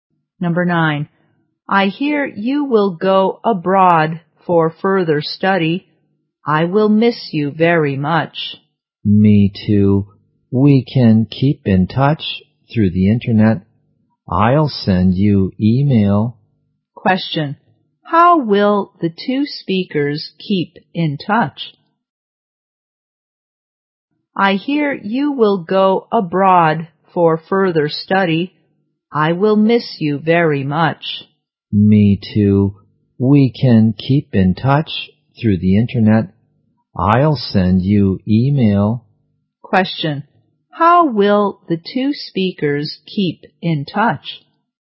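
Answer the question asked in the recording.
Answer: Through the internet, by email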